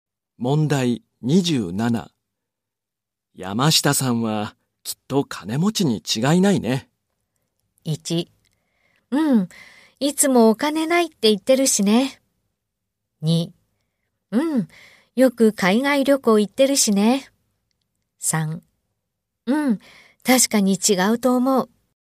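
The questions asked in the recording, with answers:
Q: 山下さんはきっと金持ちに違いないね。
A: 2: うん、よく海外旅行行ってるしね。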